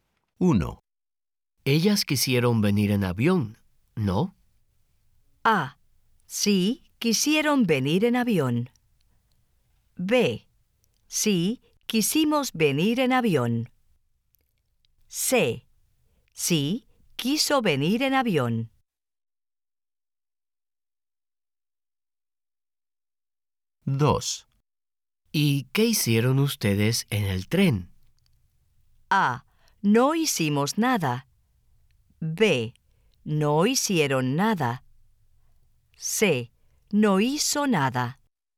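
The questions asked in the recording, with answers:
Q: Ellas quisieron venir en avión, ¿no?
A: A: Sí, quisieron venir en avión.

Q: ¿Y qué hicieron ustedes en el tren?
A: A: No hicimos nada.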